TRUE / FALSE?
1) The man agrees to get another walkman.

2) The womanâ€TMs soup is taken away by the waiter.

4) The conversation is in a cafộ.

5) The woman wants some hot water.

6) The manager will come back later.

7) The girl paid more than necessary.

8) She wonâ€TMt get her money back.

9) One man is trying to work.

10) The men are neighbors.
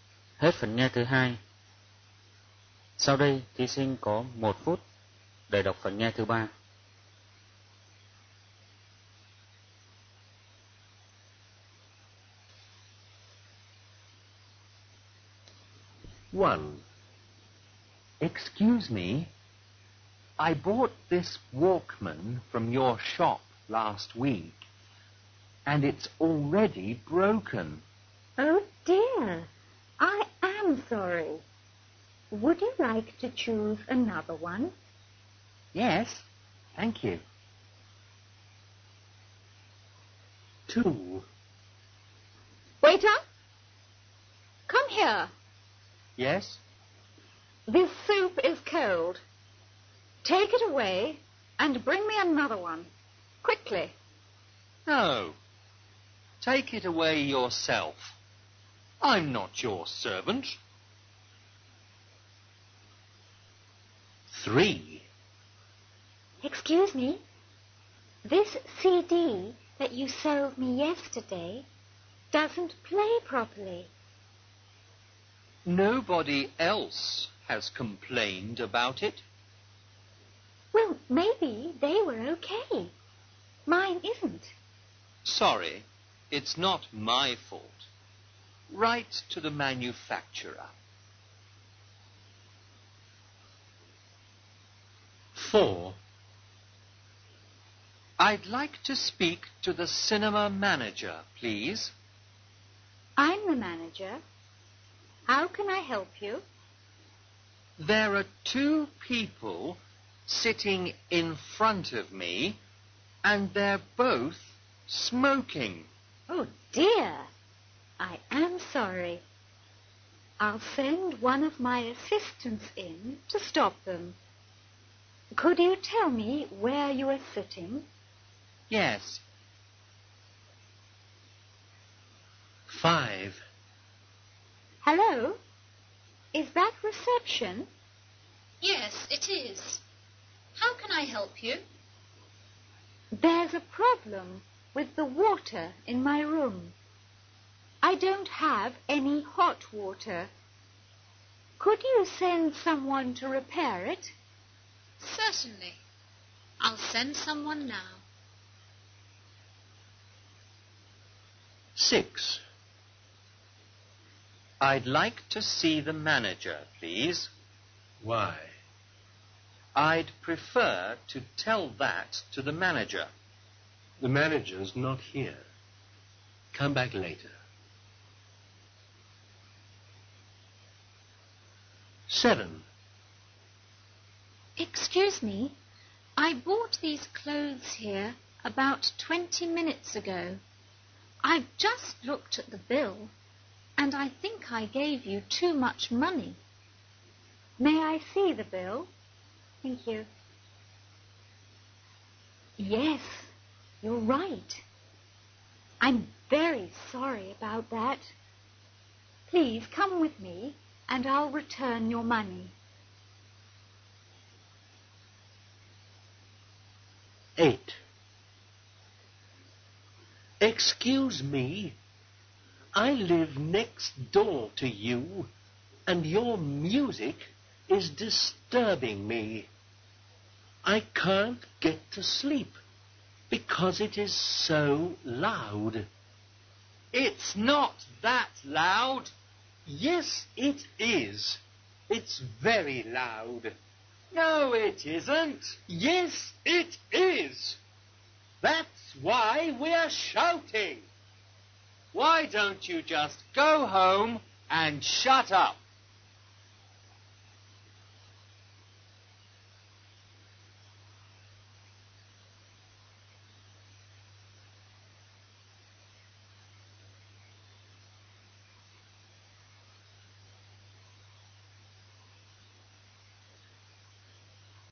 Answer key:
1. TRUE
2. FALSE
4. FALSE
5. TRUE
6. FALSE
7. TRUE
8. FALSE
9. FALSE
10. TRUE